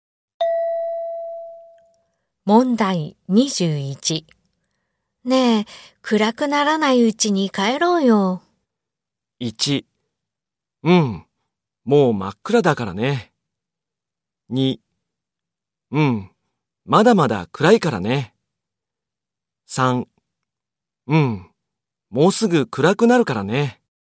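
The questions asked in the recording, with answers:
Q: ねえ、暗くならないうちに帰ろうよ。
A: 3: うん、もうすぐ暗くなるからね。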